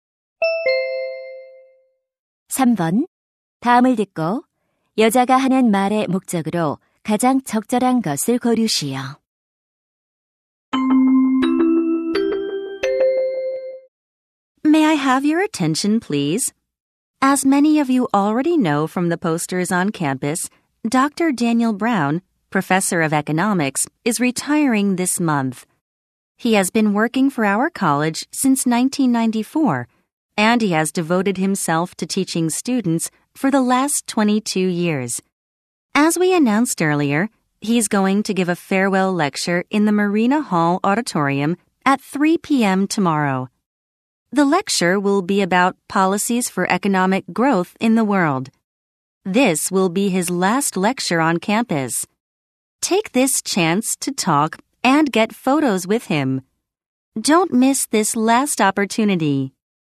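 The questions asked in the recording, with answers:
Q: 다음을 듣고 여자가 하는 말의 목적으로 가장 적절한 것을 고르시오.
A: 브라운 교수의 고별 강연을 알리려고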